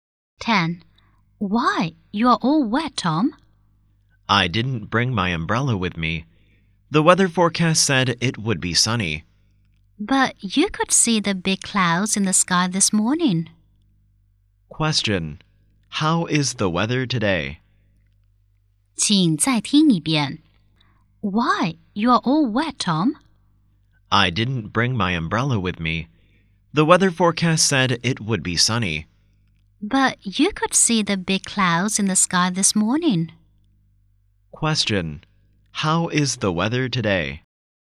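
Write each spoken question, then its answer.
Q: How is the weather today?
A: Rainy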